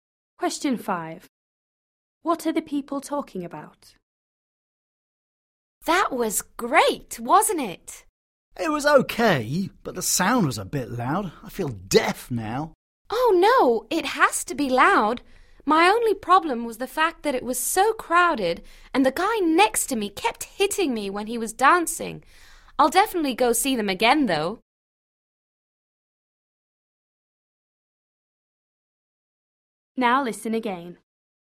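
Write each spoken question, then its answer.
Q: What are the people talking about?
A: a concert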